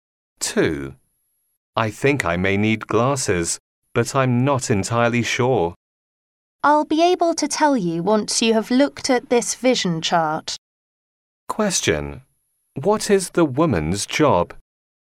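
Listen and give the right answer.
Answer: An eye doctor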